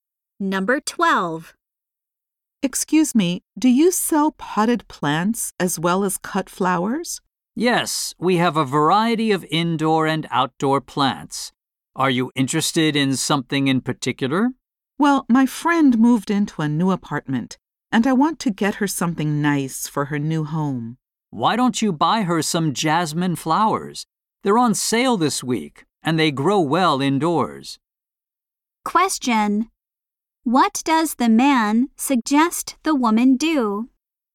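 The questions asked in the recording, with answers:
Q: What does the man suggest the woman do?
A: Buy her friend some jasmine flowers.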